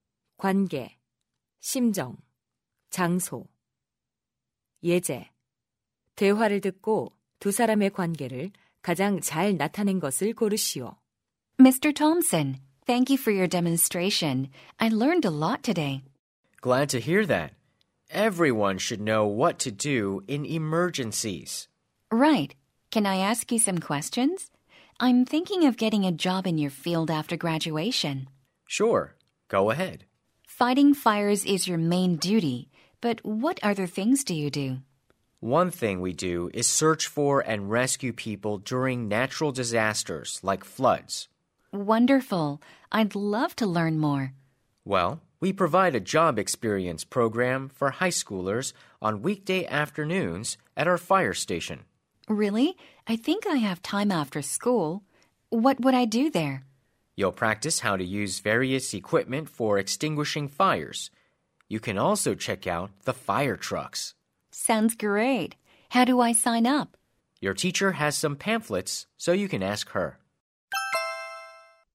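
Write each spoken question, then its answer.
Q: 대화를 듣고 두 사람의 관계를 가장 잘 나타낸 것을 고르시오.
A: 학생 - 소방관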